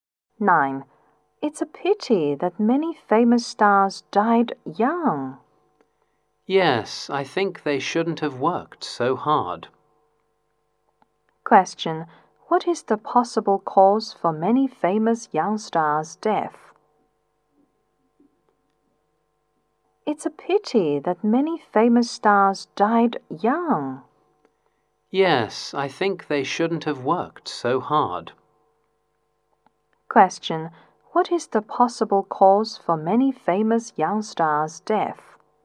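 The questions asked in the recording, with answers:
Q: What is the possible cause for many famous young stars' death?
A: They worked too hard.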